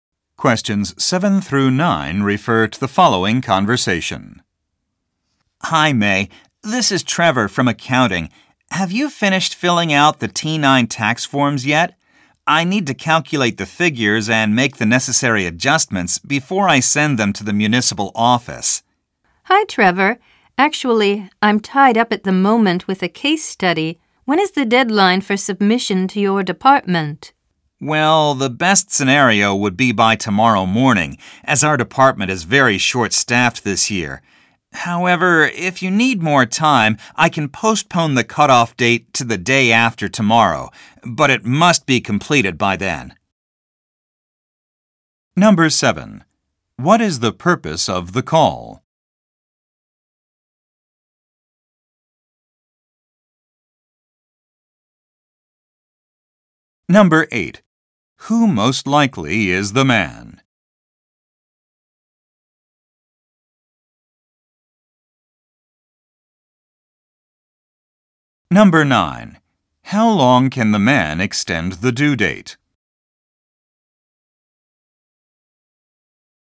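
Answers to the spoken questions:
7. To ask whether the T9 tax forms are finished
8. An accountant
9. One day (to the day after tomorrow)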